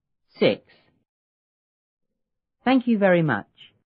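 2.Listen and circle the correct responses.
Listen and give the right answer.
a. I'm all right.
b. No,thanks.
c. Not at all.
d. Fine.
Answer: c. Not at all.

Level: 六年级下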